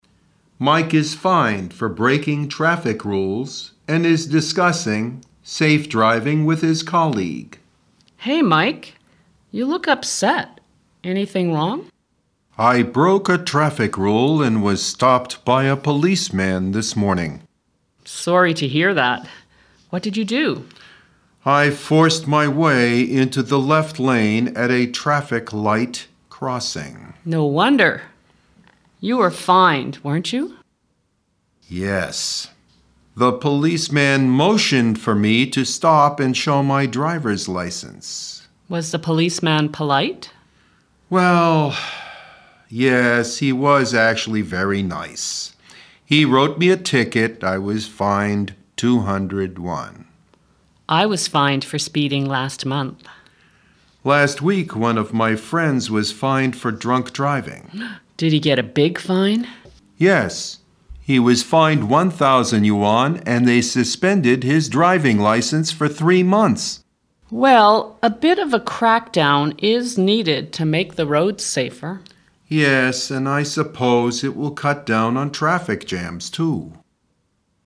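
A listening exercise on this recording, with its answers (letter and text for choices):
听对话录音,根据对话内容判断正误(每题10分)。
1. How many people were fined for breaking traffic rules?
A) One.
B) Two.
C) Three.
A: C) Three.

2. Who got the biggest fine?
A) Mike.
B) Mike's friend.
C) Helen.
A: B) Mike's friend.

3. Helen was fined for __________.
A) speeding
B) drunk driving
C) driving in the wrong lane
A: A) speeding

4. How long did Mike's friend have his driving license suspended?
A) Two months.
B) Three months.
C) Four months.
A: B) Three months.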